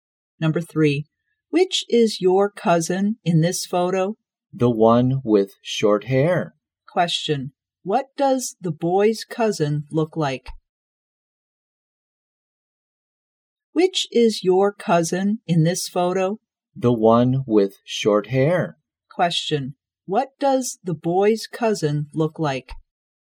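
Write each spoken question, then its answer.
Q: what does the boy's cousin look like?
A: She has short hair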